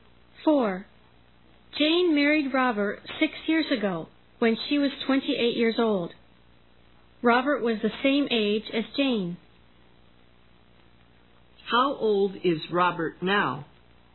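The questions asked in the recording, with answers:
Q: How old is Robert now?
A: 34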